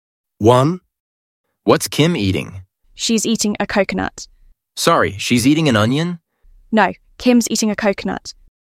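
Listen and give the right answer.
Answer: a coconut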